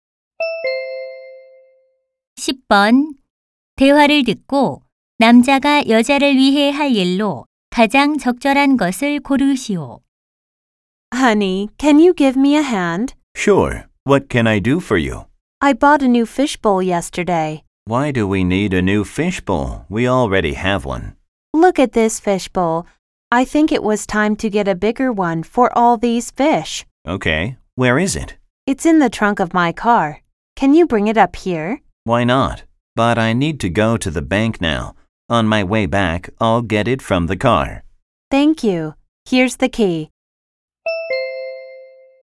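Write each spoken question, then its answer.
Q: 대화를 듣고 남자가 여자를 위해 할 일로 가장 적절한 것을 고르시오.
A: 차에서 새 어항 가져오기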